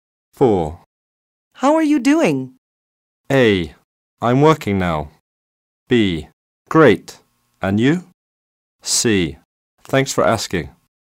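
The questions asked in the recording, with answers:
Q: How are you doing?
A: B: Great. And you?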